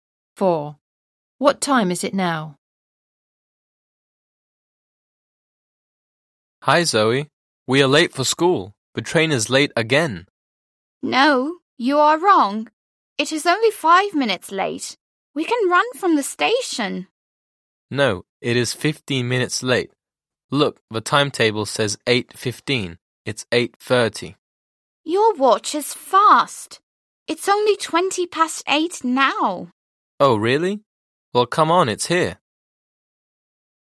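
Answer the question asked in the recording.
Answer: 8:20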